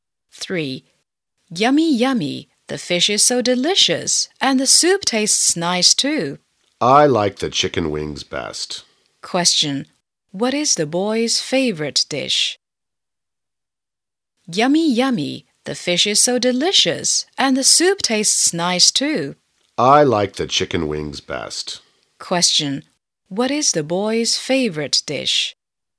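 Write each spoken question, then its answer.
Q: What is the boy's favorite dish?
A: Chicken wings.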